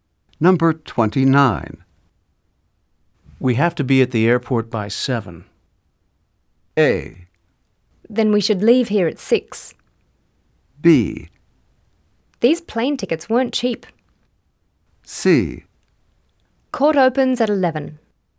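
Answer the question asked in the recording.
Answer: A: Then we should leave here at 6.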